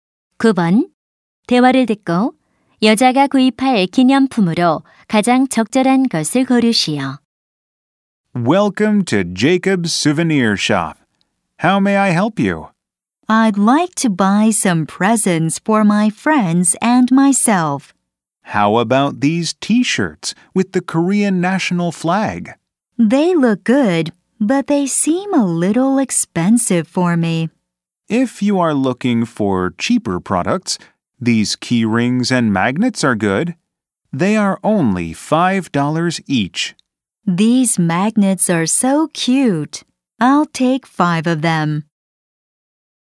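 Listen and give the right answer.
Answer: 자석 5개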